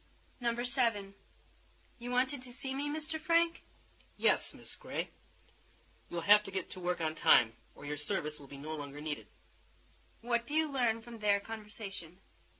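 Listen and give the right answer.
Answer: Miss Gray has been late for work and may lose her job.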